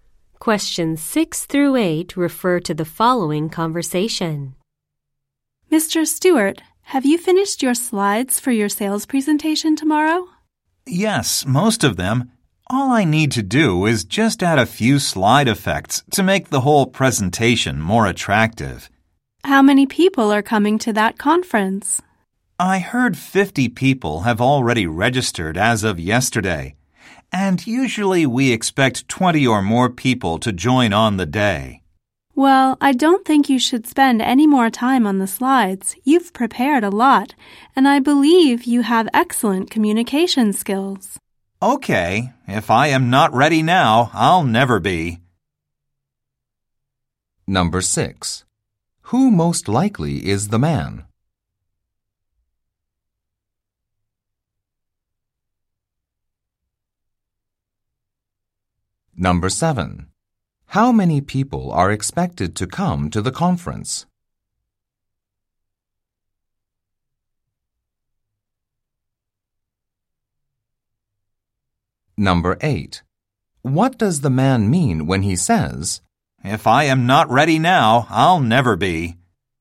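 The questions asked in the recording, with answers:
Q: How many people are expected to come to the conference?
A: About 70 or more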